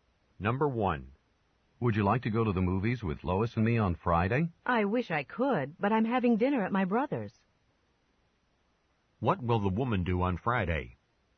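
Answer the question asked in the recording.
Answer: Have dinner at her brother's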